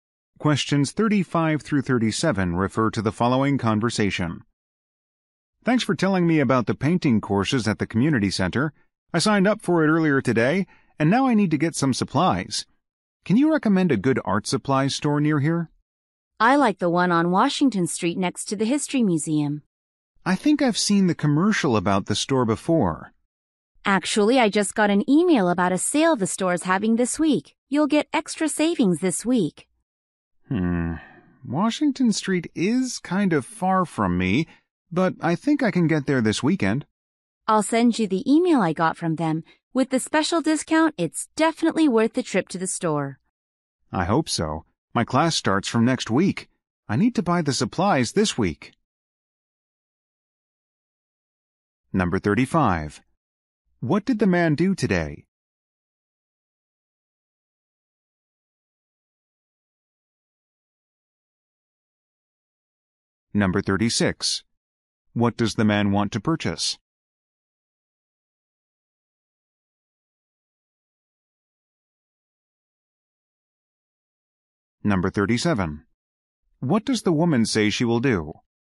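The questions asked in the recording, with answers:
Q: What did the man do today?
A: Signed up for a painting course

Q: What does the man want to purchase?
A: Art supplies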